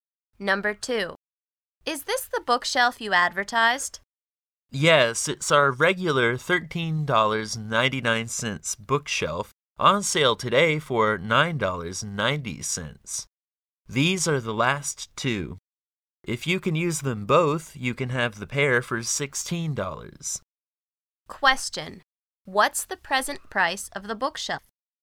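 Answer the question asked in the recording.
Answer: $9.90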